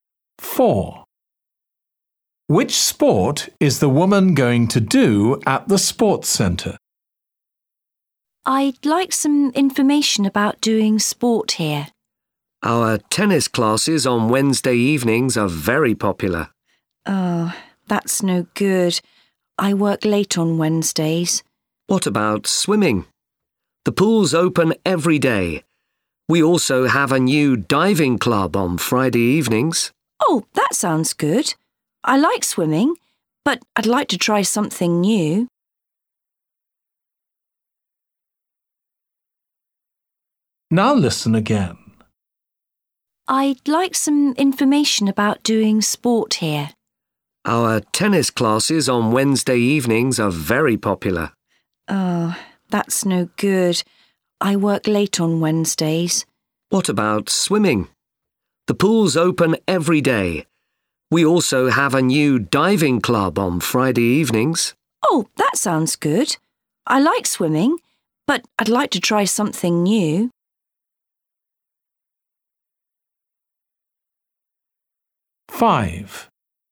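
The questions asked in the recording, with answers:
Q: Which sport is the woman going to do at the sports centre?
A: diving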